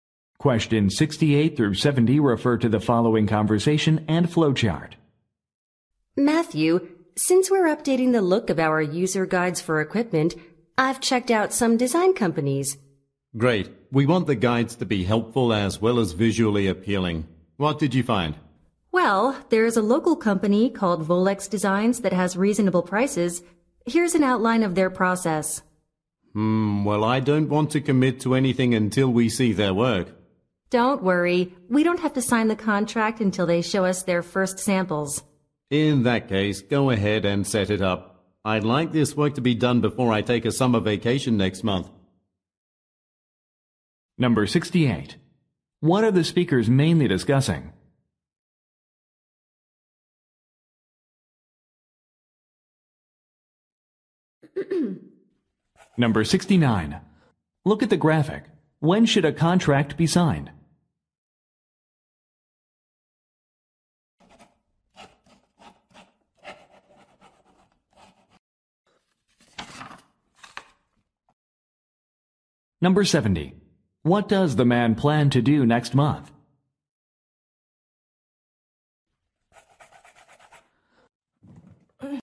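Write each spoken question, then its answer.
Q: What are the speakers mainly discussing?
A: Hiring a company to redesign user guides

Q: What does the man plan to do next month?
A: Take a summer vacation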